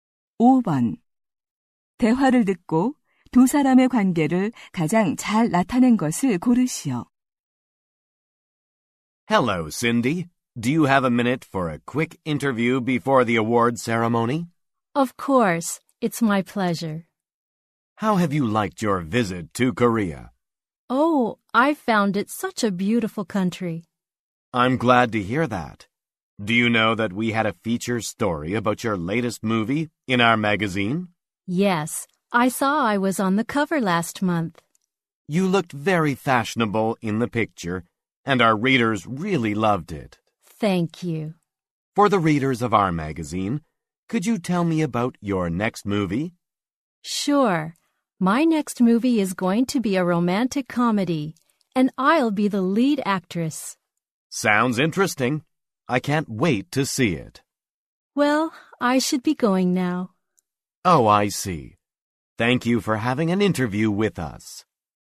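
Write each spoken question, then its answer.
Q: 대화를 듣고 두 사람의 관계를 가장 잘 나타낸 것을 고르시오.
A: 잡지 기자 - 영화배우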